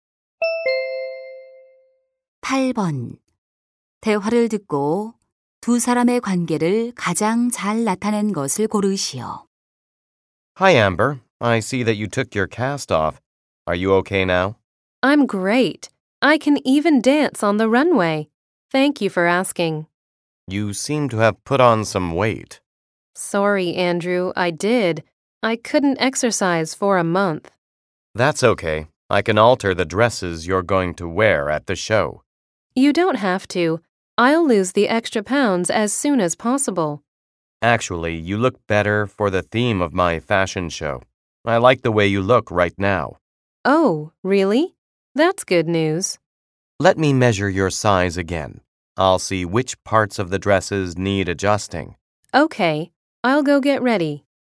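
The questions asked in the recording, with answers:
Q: 대화를 듣고 두 사람의 관계를 가장 잘 나타낸 것을 고르시오.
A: 패션 디자이너 – 모델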